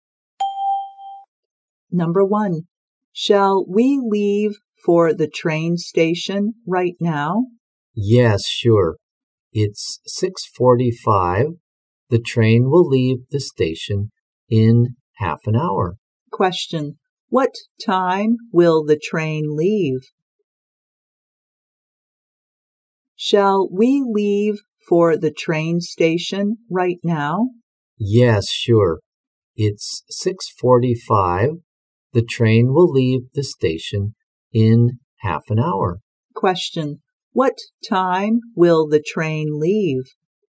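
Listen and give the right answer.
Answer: 7:15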